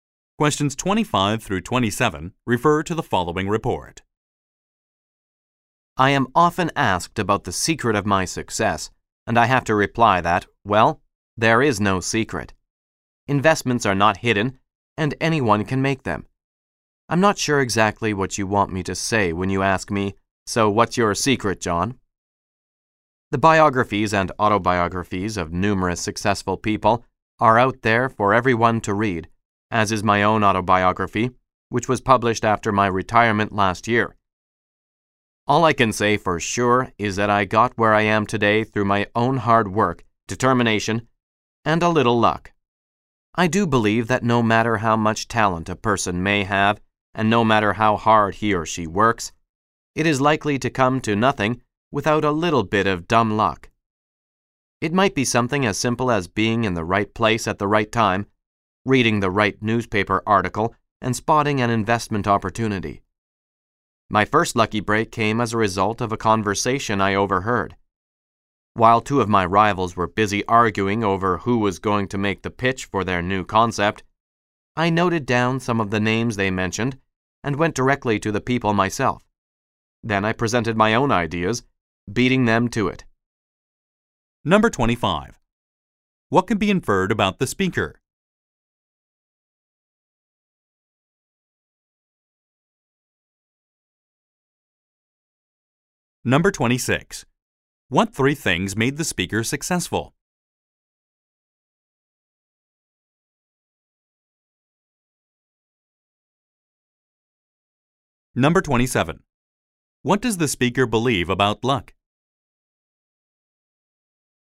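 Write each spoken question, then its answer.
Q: What three things made the speaker successful?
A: Hard work, determination and luck.

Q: What does the speaker believe about luck?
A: Success is unlikely without some luck.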